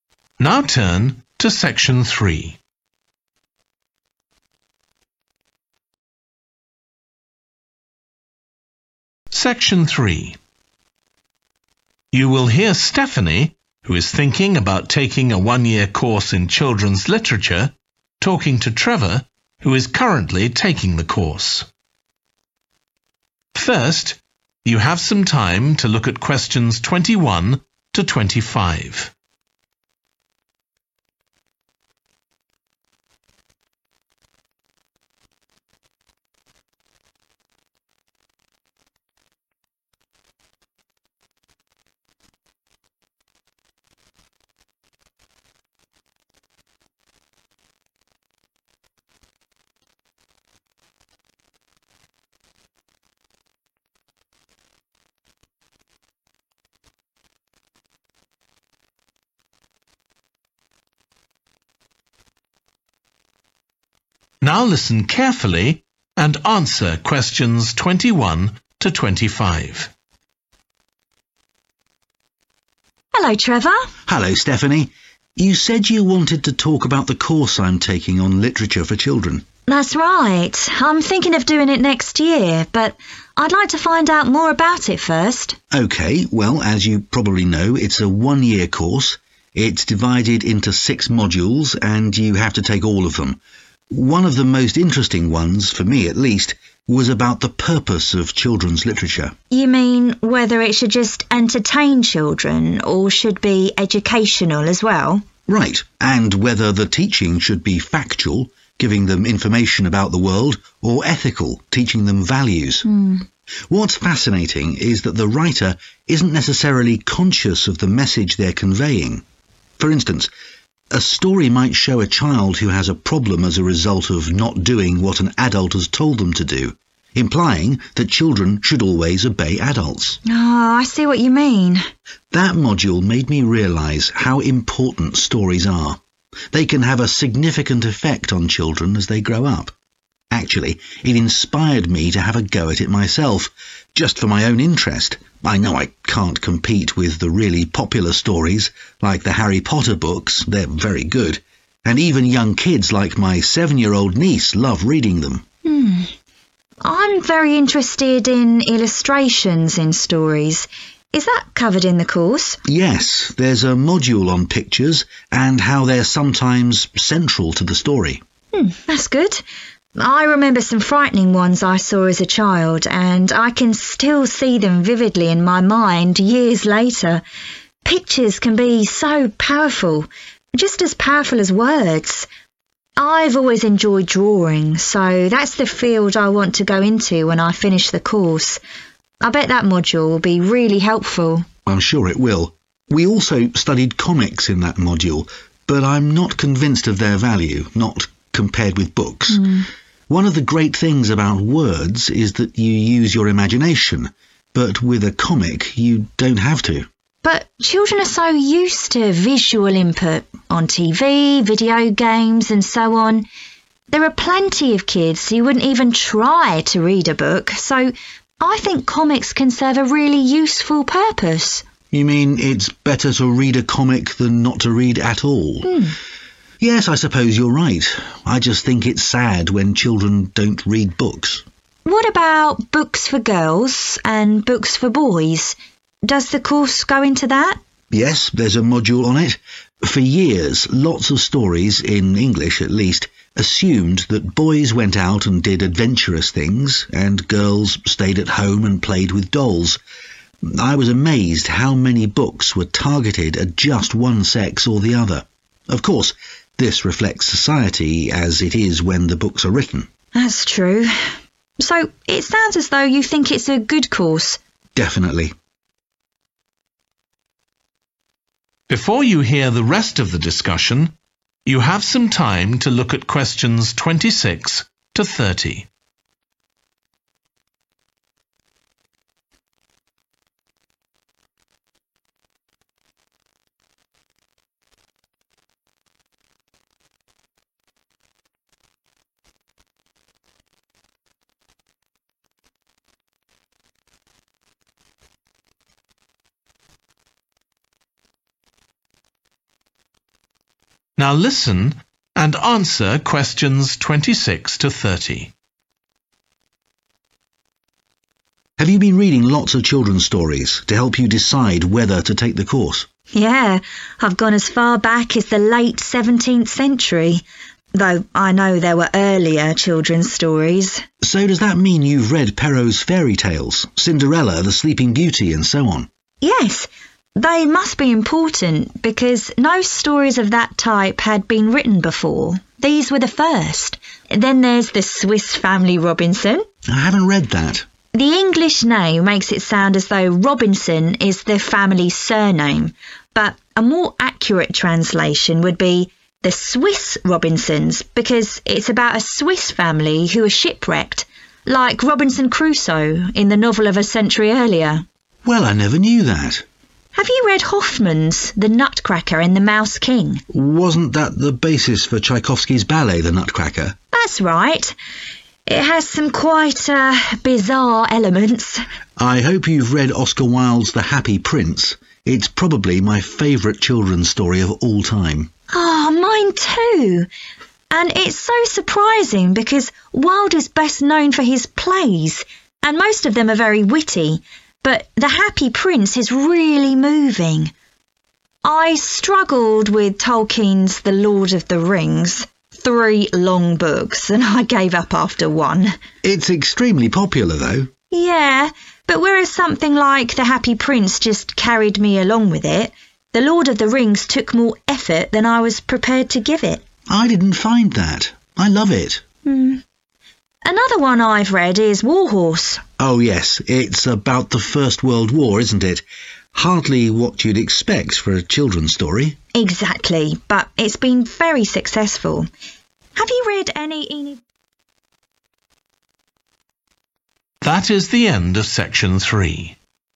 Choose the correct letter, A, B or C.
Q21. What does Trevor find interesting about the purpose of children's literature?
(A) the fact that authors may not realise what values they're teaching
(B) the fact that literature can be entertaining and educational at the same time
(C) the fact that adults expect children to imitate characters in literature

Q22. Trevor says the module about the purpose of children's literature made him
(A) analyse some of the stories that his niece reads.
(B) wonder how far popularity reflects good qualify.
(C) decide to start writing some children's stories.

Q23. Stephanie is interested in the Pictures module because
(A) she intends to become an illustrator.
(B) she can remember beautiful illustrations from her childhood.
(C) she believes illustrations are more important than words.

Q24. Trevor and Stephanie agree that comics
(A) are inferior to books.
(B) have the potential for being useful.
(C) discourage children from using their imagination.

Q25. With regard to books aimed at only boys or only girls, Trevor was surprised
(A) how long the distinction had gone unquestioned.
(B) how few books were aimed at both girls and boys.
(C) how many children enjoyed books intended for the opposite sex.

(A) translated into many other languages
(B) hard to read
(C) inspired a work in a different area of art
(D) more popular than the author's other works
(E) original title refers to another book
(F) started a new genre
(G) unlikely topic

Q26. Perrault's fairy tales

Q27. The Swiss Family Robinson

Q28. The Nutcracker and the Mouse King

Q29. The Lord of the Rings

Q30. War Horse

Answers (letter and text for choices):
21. (A) the fact that authors may not realise what values they're teaching
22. (C) decide to start writing some children's stories.
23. (A) she intends to become an illustrator.
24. (B) have the potential for being useful.
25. (B) how few books were aimed at both girls and boys.
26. (F) started a new genre
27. (E) original title refers to another book
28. (C) inspired a work in a different area of art
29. (B) hard to read
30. (G) unlikely topic